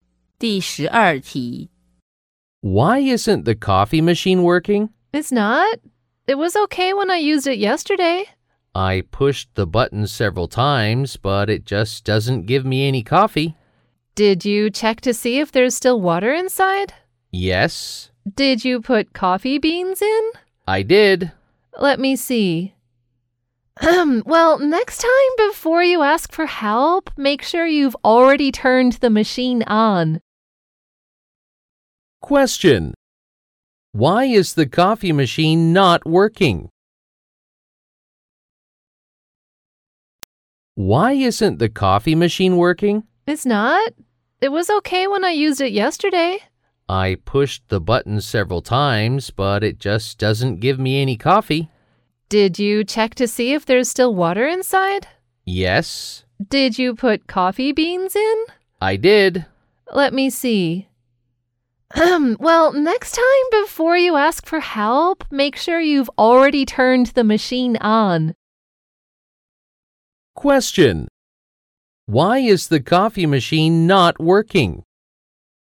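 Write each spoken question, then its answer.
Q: Why is the coffee machine not working?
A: It was not turned on.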